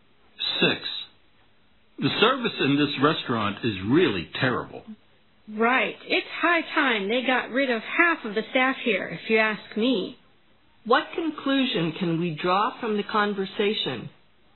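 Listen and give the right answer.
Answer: They think the restaurant's service is terrible and half the staff should be fired.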